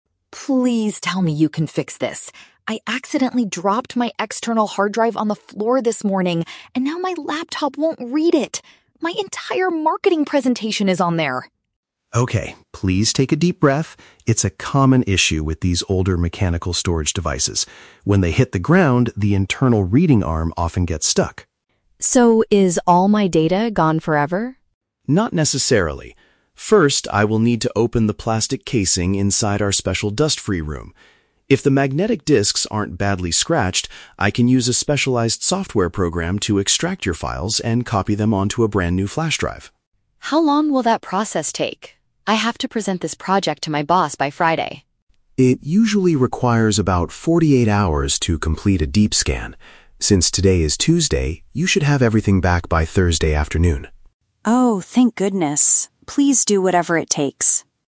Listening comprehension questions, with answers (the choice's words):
Listen to a conversation between a customer and a computer technician. For each question, choose the correct answer (A, B, or C).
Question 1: What caused the customer to panic?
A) She broke a device containing an essential work assignment.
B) She accidentally deleted all the files on her new flash drive.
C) Her laptop computer stopped working right before a meeting.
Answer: She broke a device containing an essential work assignment.

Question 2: How will the technician begin the recovery process?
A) By running a complicated software program to find the files.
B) By opening the equipment in a completely clean environment.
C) By replacing the broken mechanical reading arm with a new one.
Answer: By opening the equipment in a completely clean environment.

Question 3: When will the woman most likely get her documents back?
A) Just before her meeting on Friday morning.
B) Sometime on Tuesday evening after the scan.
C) In approximately two days from now.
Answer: In approximately two days from now.

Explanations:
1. Sarah says she "dropped my external hard drive" and her "entire marketing presentation is on there." Option (A) paraphrases this perfectly ("broke a device" for dropping the hard drive, "essential work assignment" for marketing presentation). Option (B) is a trap; a "flash drive" is mentioned by the technician as the place he will copy the recovered files to, not what she lost. Option (C) is a trap; her laptop won't read the drive, but the laptop itself isn't broken.
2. Mark explains that his first step is to "open the plastic casing inside our special dust-free room." Option (B) uses synonyms ("equipment" for casing/device, "completely clean environment" for dust-free room). Option (A) is a trap; using the software program is the second step (if the disks aren't scratched). Option (C) sounds plausible for a repair, but he never says he will replace the arm, only that it gets stuck.
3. Mark states the process requires "about forty-eight hours" and she will have it back by "Thursday afternoon" (since today is Tuesday). Option (C) correctly paraphrases 48 hours as "two days." Option (A) is a trap; Friday is the deadline for her presentation, not when she gets the data back. Option (B) is a trap; Tuesday is today, the scan takes 48 hours so it won't be ready by Tuesday evening.

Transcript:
Sarah: Please tell me you can fix this! I accidentally dropped my external hard drive on the floor this morning, and now my laptop won't read it. My entire marketing presentation is on there!
Mark: Okay, please take a deep breath. It's a common issue with these older mechanical storage devices. When they hit the ground, the internal reading arm often gets stuck.
Sarah: So, is all my data gone forever?
Mark: Not necessarily. First, I will need to open the plastic casing inside our special dust-free room. If the magnetic disks aren't badly scratched, I can use a specialized software program to extract your files and copy them onto a brand new flash drive.
Sarah: How long will that process take? I have to present this project to my boss by Friday.
Mark: It usually requires about forty-eight hours to complete a deep scan. Since today is Tuesday, you should have everything back by Thursday afternoon.